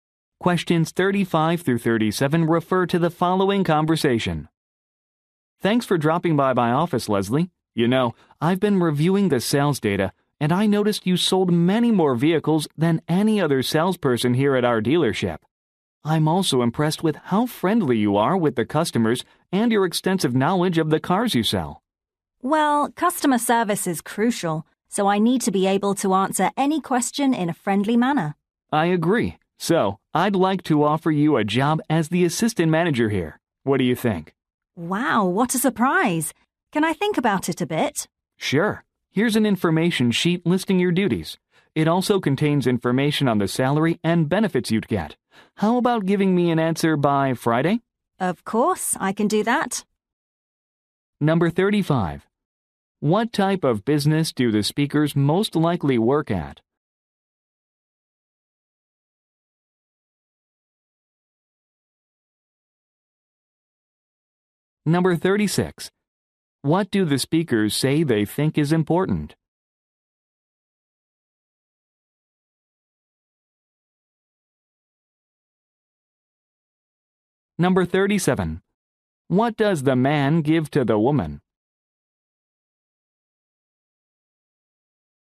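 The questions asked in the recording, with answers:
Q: What type of business do the speakers most likely work at?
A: A car dealership

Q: What do the speakers say they think is important?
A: Customer service

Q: What does the man give to the woman?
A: An information sheet listing job duties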